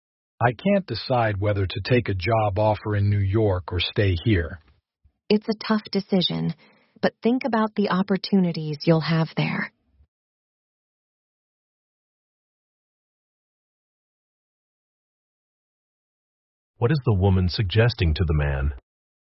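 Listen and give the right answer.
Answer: To consider the opportunities in New York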